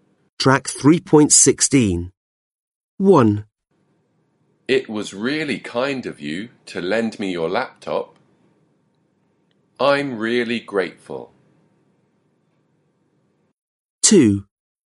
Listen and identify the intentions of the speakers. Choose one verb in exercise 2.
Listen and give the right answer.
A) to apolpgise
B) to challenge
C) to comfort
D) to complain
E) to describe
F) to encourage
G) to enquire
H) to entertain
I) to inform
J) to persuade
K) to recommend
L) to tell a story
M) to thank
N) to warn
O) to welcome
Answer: M) to thank

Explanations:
It was really kind of you to lend me your laptop. I'm really grateful.

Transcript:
1. It was really kind of you to lend me your laptop. I'm really grateful.

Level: Lớp 10